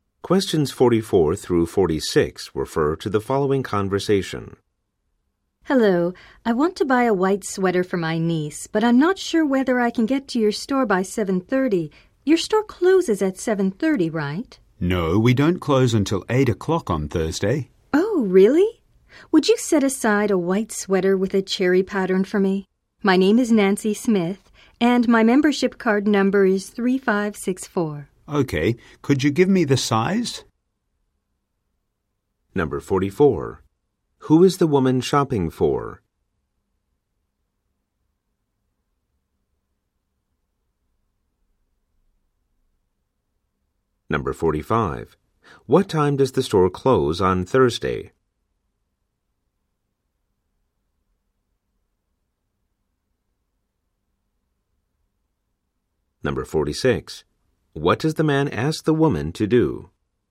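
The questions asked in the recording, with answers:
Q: Who is the woman shopping for?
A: Her niece

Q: What time does the store close on Thursday?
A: 8 o'clock

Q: What does the man ask the woman to do?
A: Give him the sweater size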